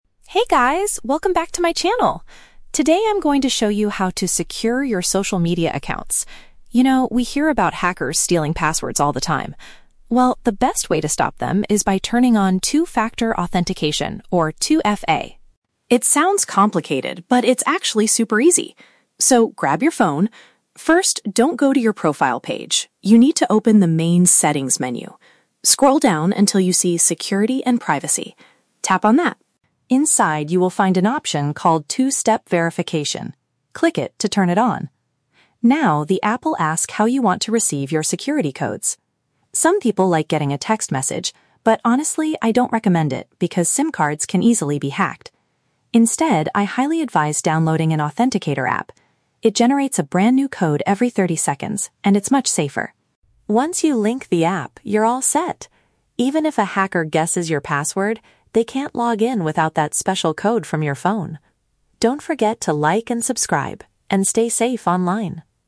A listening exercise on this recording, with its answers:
Listen to the vlogger giving a tutorial on account security, and choose the correct answer (A, B, or C) for each question.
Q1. Where does the vlogger tell the viewers to go first?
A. The application's help center.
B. Their personal profile page.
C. The main configuration menu.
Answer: The main configuration menu.

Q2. Why does the speaker dislike using text messages for security codes?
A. They are vulnerable to being compromised by criminals.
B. The messages usually expire after thirty seconds.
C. The phone company charges a fee for every text.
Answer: They are vulnerable to being compromised by criminals.

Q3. What is the main benefit of using this two-step feature?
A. It makes it impossible for anyone to guess your password.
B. It stops unauthorized people from accessing the account.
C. It automatically reports hackers to the social media company.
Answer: It stops unauthorized people from accessing the account.

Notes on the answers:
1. The vlogger tells viewers to open the "main 'Settings' menu." Option C uses the synonym "configuration menu" for "settings." Why the traps are wrong: Option B is a trap; the vlogger specifically says, "don't go to your profile page." Option A is plausible for a tech tutorial, but the help center is never mentioned in the audio.
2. The vlogger does not recommend text messages because "SIM cards can easily be hacked." Option A paraphrases this as being "vulnerable to being compromised." Why the traps are wrong: Option B is a trap because the audio mentions "thirty seconds," but that is how fast the authenticator app creates new codes, not when text messages expire. Option C is a logical guess, but fees are never mentioned.
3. The speaker says that even if a hacker has your password, "they can't log in without that special code." Option B paraphrases this as stopping "unauthorized people from accessing the account." Why the traps are wrong: Option A is a trap. The audio actually says "Even if a hacker guesses your password," which means 2FA does not stop people from guessing it; it just stops them from getting in. Option C is a plausible feature for an app, but it is not mentioned in the video.

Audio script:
Vlogger: Hey guys, welcome back to my channel! Today, I'm going to show you how to secure your social media accounts. You know, we hear about hackers stealing passwords all the time. Well, the best way to stop them is by turning on Two-Factor Authentication, or 2FA.
It sounds complicated, but it's actually super easy. So, grab your phone. First, don't go to your profile page; you need to open the main "Settings" menu. Scroll down until you see "Security and Privacy." Tap on that.
Inside, you will find an option called "Two-Step Verification." Click it to turn it on. Now, the app will ask how you want to receive your security codes. Some people like getting a text message, but honestly, I don't recommend it because SIM cards can easily be hacked. Instead, I highly advise downloading an authenticator app. It generates a brand-new code every thirty seconds, and it's much safer.
Once you link the app, you're all set! Even if a hacker guesses your password, they can't log in without that special code from your phone. Don't forget to like and subscribe, and stay safe online!

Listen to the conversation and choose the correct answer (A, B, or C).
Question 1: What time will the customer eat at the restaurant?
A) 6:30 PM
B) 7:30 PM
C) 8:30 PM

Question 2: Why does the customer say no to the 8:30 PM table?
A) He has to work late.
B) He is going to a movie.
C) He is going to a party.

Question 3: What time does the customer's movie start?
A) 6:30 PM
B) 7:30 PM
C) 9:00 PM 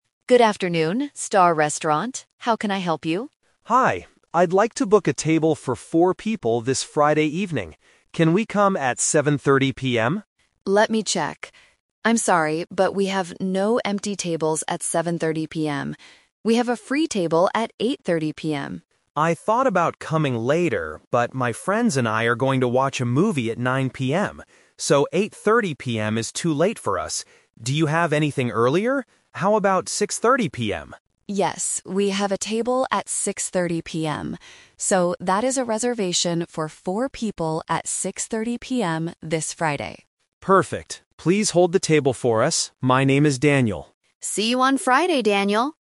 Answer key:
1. 6:30 PM
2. He is going to a movie.
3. 9:00 PM

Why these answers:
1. They finally agree to book the table at 6:30 PM. Option (B) is a trap because 7:30 PM is the customer's first choice, but the restaurant is full. Option (C) is a trap because the receptionist offers 8:30 PM, but the customer rejects it.
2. The customer says, "my friends and I are going to watch a movie at 9:00 PM." Option (A) and Option (C) are plausible reasons for someone to be busy on a Friday night, but they are not mentioned in the audio.
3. The customer explicitly states they will watch a movie at "9:00 PM." Option (A) is a trap because 6:30 PM is the time for dinner, not the movie. Option (B) is a trap because 7:30 PM was the original time he wanted to eat.

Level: A2

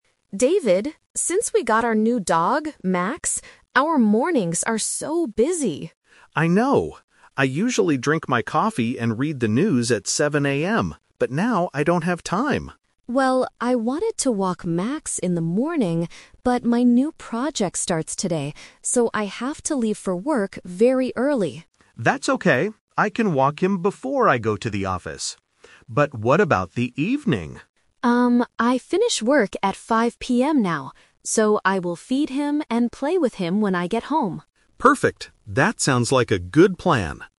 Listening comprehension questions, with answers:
Listen to the conversation and choose the correct answer (A, B, or C).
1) What did David usually do at 7:00 AM in the past?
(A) Walk the dog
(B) Go to the office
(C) Drink coffee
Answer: Drink coffee

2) Who is going to walk the dog in the morning?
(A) Emma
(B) David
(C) Both of them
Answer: David

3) What will Emma do in the evening?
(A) Feed the dog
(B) Walk the dog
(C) Read the news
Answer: Feed the dog

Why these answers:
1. David says "I usually drink my coffee and read the news at 7:00 AM, but now I don't have time." Option A is a trap because walking the dog is his new morning task, not his past habit. Option B is not his 7:00 AM activity.
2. David says "I can walk him before I go to the office." Option A (Emma) is a trap. Emma wanted to do it, but she can't because she has to leave for work very early.
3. Emma says "I will feed him and play with him when I get home." Option B is a trap because David walks the dog in the morning, not Emma in the evening. Option C is a trap because reading the news was David's past habit.

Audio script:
Emma: David, since we got our new dog, Max, our mornings are so busy!
David: I know! I usually drink my coffee and read the news at 7:00 AM, but now I don't have time.
Emma: Well, I wanted to walk Max in the morning, but my new project starts today, so I have to leave for work very early.
David: That's okay. I can walk him before I go to the office. But what about the evening?
Emma: Um, I finish work at 5:00 PM now. So, I will feed him and play with him when I get home.
David: Perfect. That sounds like a good plan.

